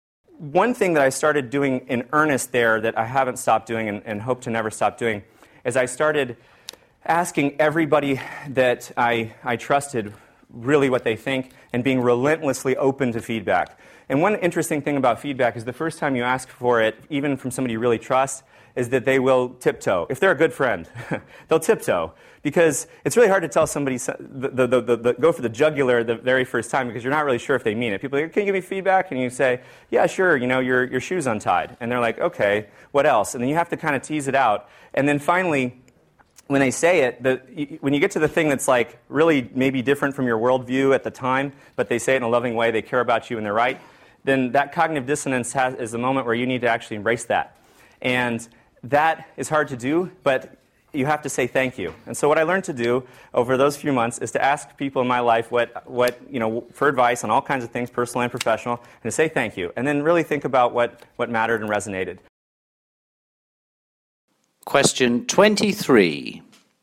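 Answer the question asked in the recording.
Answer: At first people hold back, so you must draw it out, accept hard truths and say thank you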